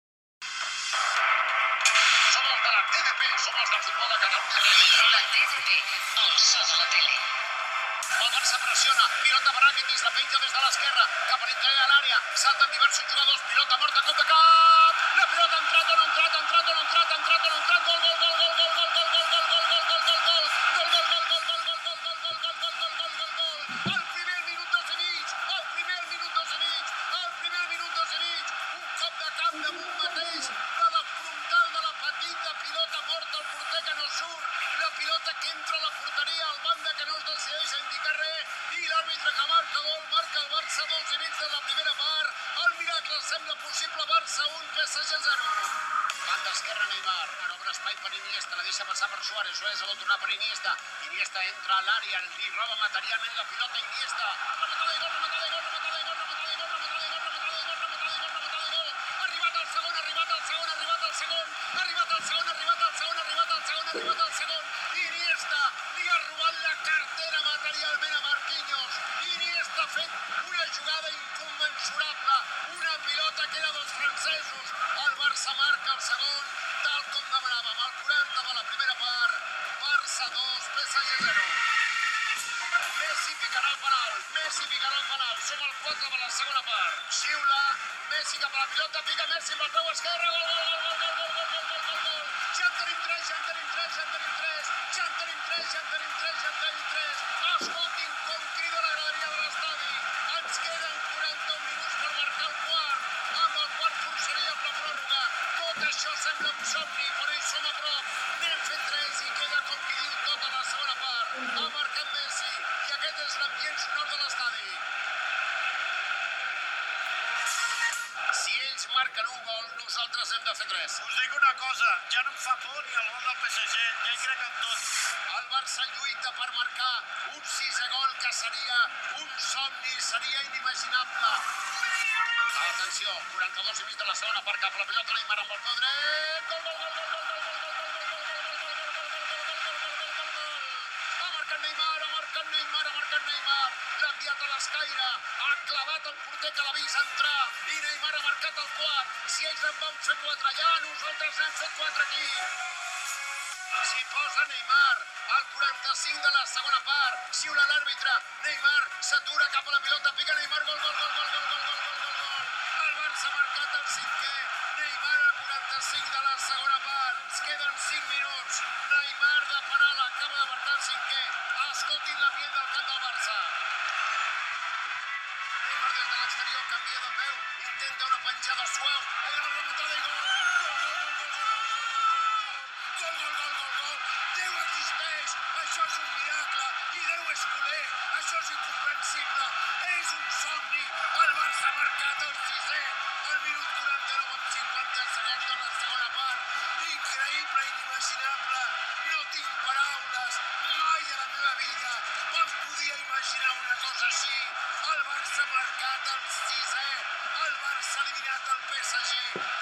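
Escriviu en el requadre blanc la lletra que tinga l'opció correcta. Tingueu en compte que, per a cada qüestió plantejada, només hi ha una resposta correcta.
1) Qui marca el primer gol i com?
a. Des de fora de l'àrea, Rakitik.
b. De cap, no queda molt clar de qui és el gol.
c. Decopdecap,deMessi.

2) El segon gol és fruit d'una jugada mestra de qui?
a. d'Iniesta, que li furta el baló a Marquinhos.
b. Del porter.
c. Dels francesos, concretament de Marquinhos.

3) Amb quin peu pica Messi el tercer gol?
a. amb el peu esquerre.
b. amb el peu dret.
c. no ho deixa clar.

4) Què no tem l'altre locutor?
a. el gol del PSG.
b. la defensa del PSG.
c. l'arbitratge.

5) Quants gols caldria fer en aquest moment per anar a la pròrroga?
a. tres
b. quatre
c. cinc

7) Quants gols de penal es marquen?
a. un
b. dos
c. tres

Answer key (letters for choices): 1b, 2a, 3a, 4a, 5b, 7b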